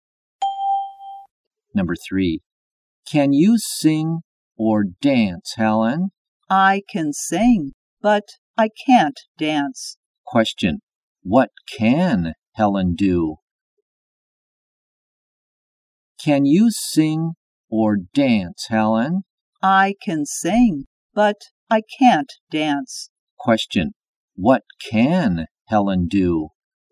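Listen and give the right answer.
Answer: She can sing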